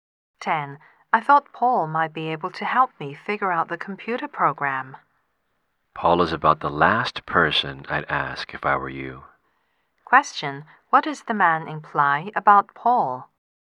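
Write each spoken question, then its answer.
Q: What does the man imply about Paul?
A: Paul isn't likely to be able to help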